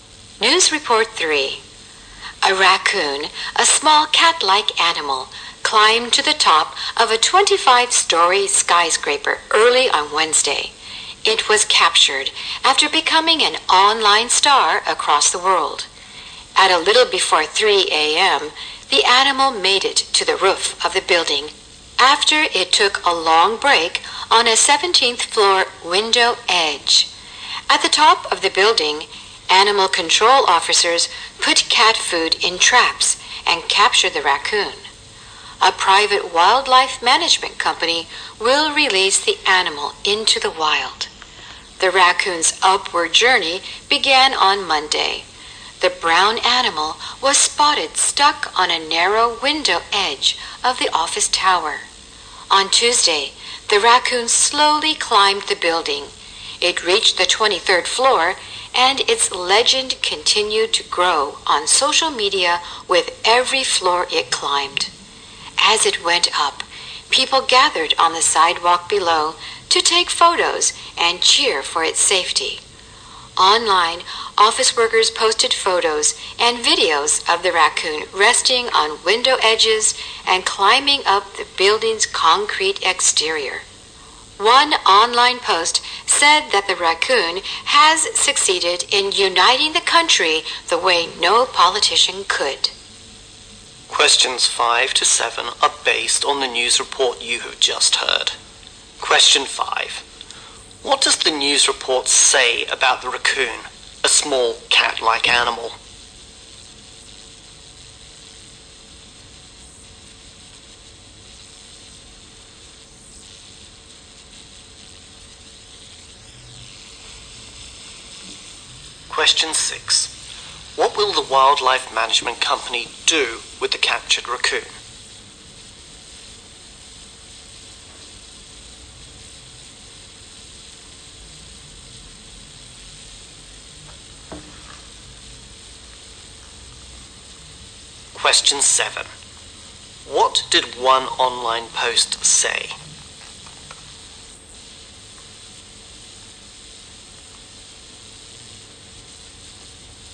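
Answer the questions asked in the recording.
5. It climbed to the top of a 25-story skyscraper and became an online star.
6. Release it into the wild.
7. The raccoon united the country the way no politician could.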